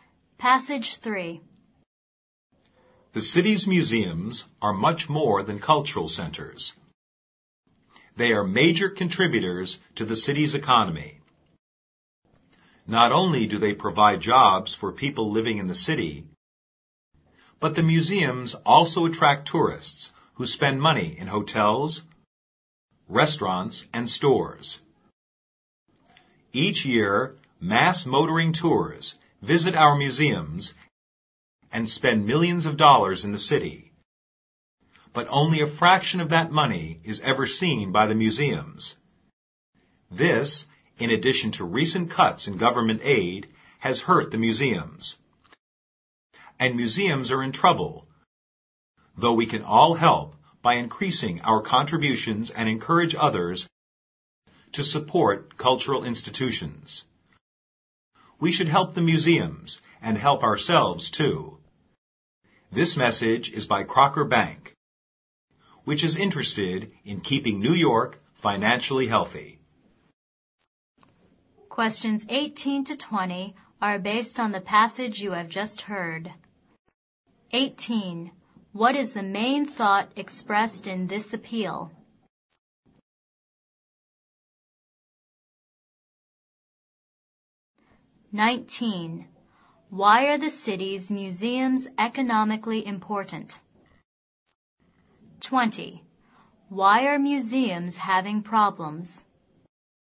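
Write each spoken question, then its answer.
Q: What is the main thought expressed in this appeal?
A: People should help support the city's museums

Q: Why are the city's museums economically important?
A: They provide jobs and attract tourists who spend money in the city

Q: Why are museums having problems?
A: They get only a small share of tourist spending, and government aid has been cut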